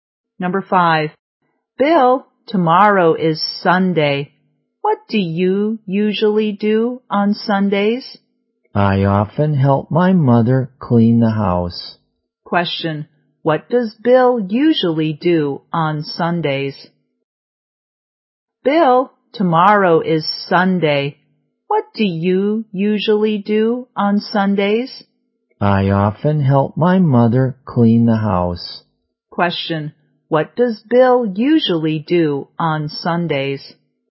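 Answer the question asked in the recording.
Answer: He helps his mother clean the house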